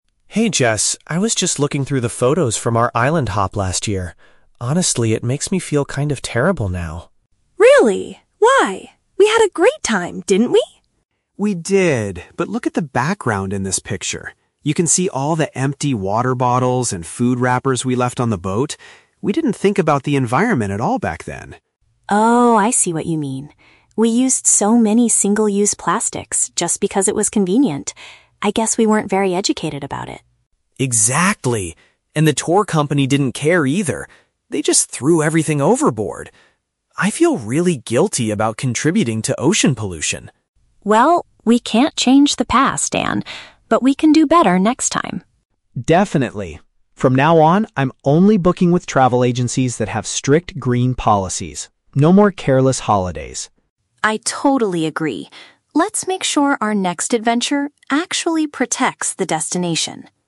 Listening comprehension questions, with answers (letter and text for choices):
Listen to two friends talking about their past holidays. Choose the correct answer (A, B, or C) for each question.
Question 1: Why does Daniel feel upset when looking at his old vacation pictures?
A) Because he did not enjoy the island trip.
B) Because he notices the amount of trash his group created.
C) Because he lost some of his favorite photographs.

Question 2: What was the problem with the business that organized their previous trip?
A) They did not try to protect the marine environment.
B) They refused to provide food and drinks for the tourists.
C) They charged too much money for the boat ride.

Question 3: What does Daniel decide to do for future vacations?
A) He will organize beach clean-up events by himself.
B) He will stop going on boat tours completely.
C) He will select businesses that care about nature.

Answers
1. B) Because he notices the amount of trash his group created.
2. A) They did not try to protect the marine environment.
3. C) He will select businesses that care about nature.

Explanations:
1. Daniel points out the "empty water bottles and food wrappers" (paraphrased as "trash") in the background of his photos, which makes him feel terrible. Why traps are wrong: Option A is the Trap. Jessica asks if they didn't have a great time, but Daniel confirms "We did" (they enjoyed it). Option C is plausible but never mentioned in the audio.
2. Daniel says the tour company "didn't care" and "threw everything overboard," which contributed to "ocean pollution." This means they did not protect the marine environment. Why traps are wrong: Option B is a Trap. The audio mentions "food wrappers" and "water bottles," which implies they did have food and drinks. Option C is plausible for a bad company, but the cost of the trip is not mentioned.
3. Daniel promises that from now on, he is only booking with travel agencies that have "strict green policies" (paraphrased as "businesses that care about nature"). Why traps are wrong: Option B is the Trap. He says "No more careless holidays," meaning he wants to travel more responsibly, not stop taking boat tours entirely. Option A is a good eco-friendly action, but it is not mentioned in the dialogue.

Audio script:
Daniel: Hey Jess, I was just looking through the photos from our island hop last year. Honestly, it makes me feel kind of terrible now.
Jessica: Really? Why? We had a great time, didn't we?
Daniel: We did, but look at the background in this picture. You can see all the empty water bottles and food wrappers we left on the boat. We didn't think about the environment at all back then.
Jessica: Oh, I see what you mean. We used so many single-use plastics just because it was convenient. I guess we weren't very educated about it.
Daniel: Exactly. And the tour company didn't care either. They just threw everything overboard! I feel really guilty about contributing to ocean pollution.
Jessica: Well, we can't change the past, Dan. But we can do better next time.
Daniel: Definitely. From now on, I'm only booking with travel agencies that have strict green policies. No more careless holidays.
Jessica: I totally agree. Let's make sure our next adventure actually protects the destination.